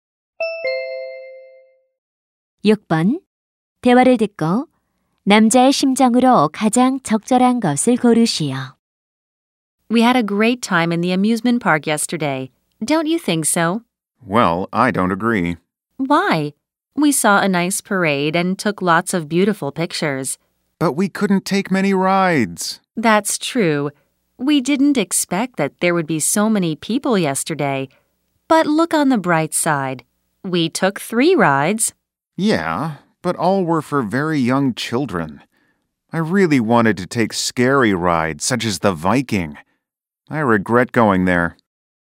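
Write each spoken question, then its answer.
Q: 대화를 듣고 남자의 심정으로 가장 적절한 것을 고르시오.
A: 실망함, 후회함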